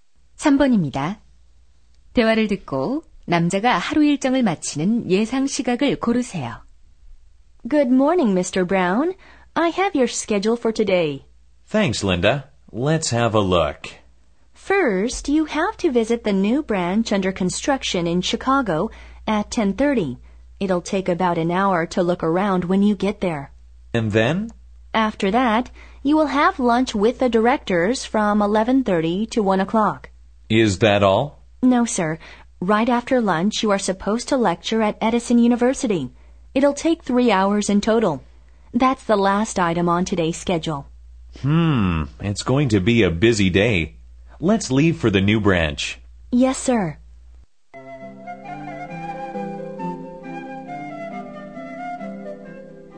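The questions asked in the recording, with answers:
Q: 대화를 듣고 남자가 하루 일정을 마치는 예상 시각을 고르세요.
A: 오후 4시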